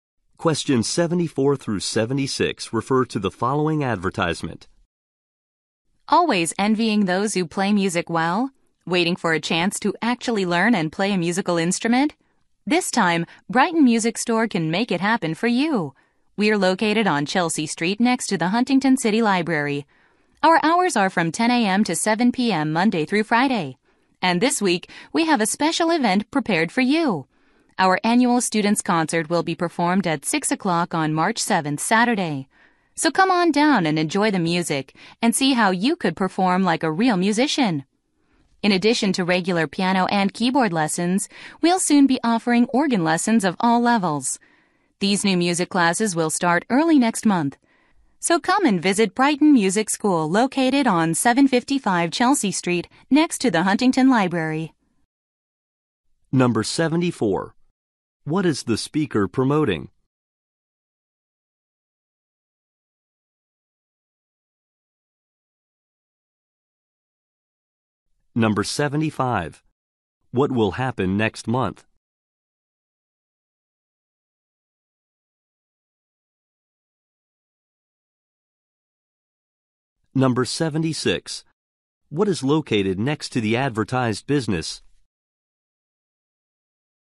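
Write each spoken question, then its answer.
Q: What is the speaker promoting?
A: A music store/school offering music lessons

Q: What will happen next month?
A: New organ classes will start

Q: What is located next to the advertised business?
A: The Huntington City Library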